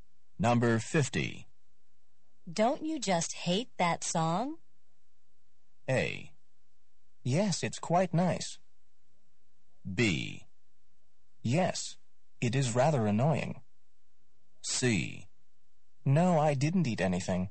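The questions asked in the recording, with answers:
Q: Don't you just hate that song?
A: B: Yes, it is rather annoying.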